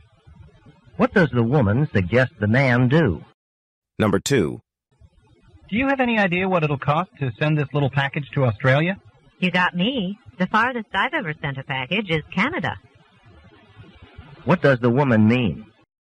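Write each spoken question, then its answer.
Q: What does the woman mean?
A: She doesn't know the cost of sending the package to Australia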